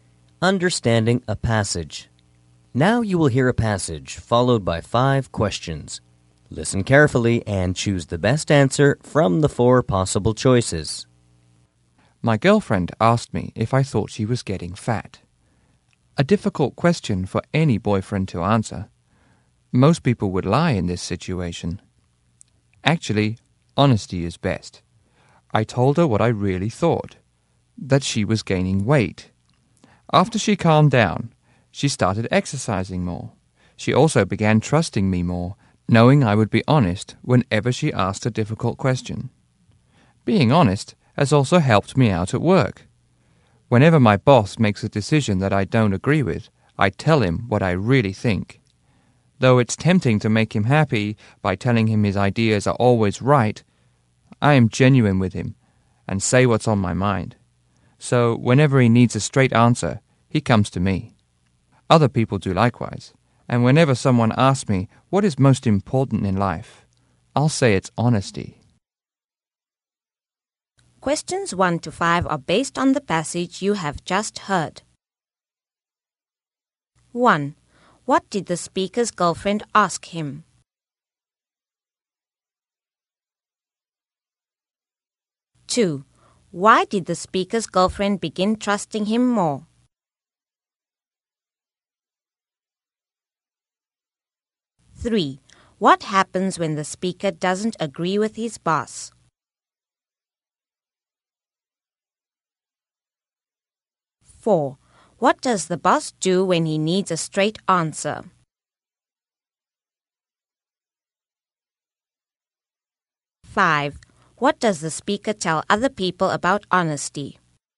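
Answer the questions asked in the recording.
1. Whether he thought she was getting fat.
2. She knew he would be honest whenever she asked a difficult question.
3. He tells the boss what he really thinks.
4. He comes to the speaker.
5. That honesty is the most important thing in life.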